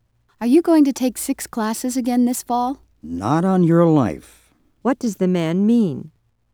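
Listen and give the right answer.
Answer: He will definitely not take six classes again.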